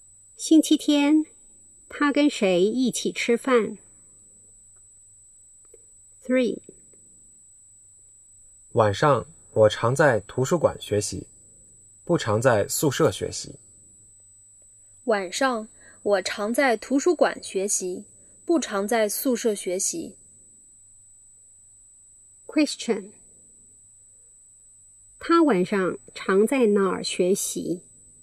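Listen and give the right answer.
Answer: 图书馆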